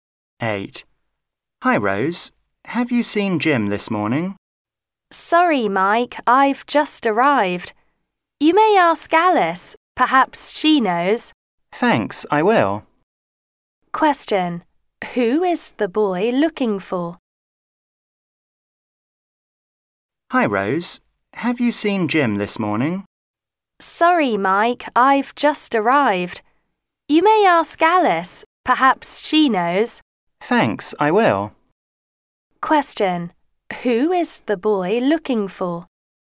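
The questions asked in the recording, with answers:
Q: Who is the boy looking for?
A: Jim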